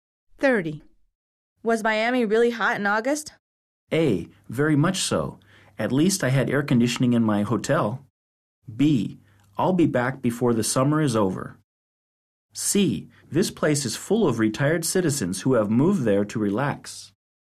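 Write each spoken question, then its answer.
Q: Was Miami really hot in August?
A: A: Very much so. At least I had air conditioning in my hotel.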